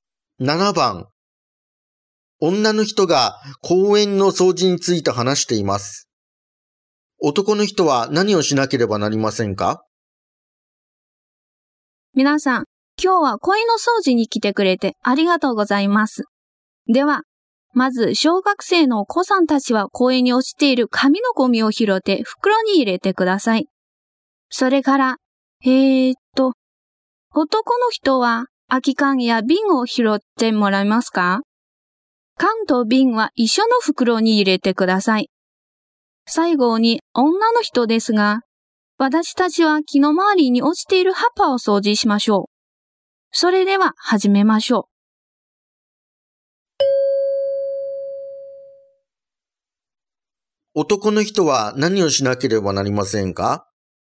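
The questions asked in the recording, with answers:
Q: 男の人は何をしなければなりませんか?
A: 空き缶や瓶を拾う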